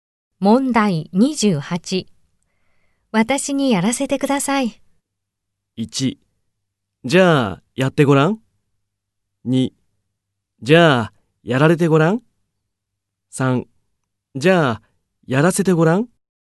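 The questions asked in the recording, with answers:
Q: 私にやらせてください。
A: 1: じゃあやってごらん。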